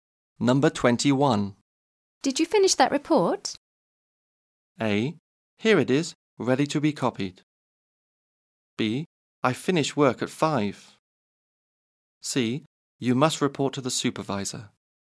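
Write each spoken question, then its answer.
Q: Did you finish that report?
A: A: Here it is, ready to be copied.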